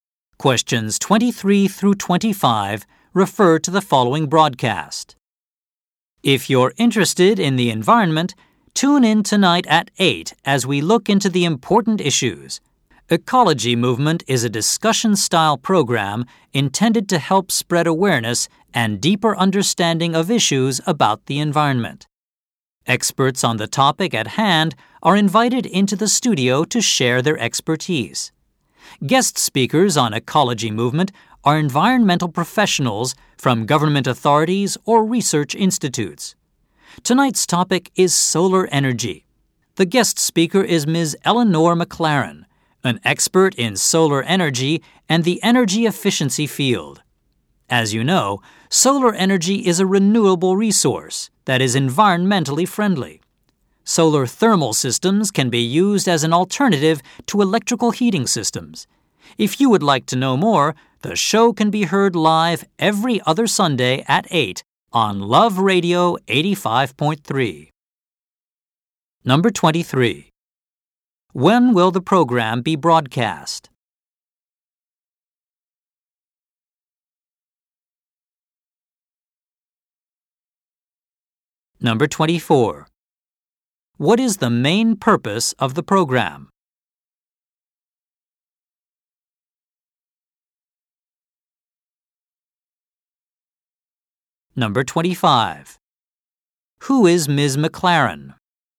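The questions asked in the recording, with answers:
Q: When will the program be broadcast?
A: Tonight at 8

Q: What is the main purpose of the program?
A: To spread awareness and understanding of environmental issues

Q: Who is Ms. McLaren?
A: An expert in solar energy and energy efficiency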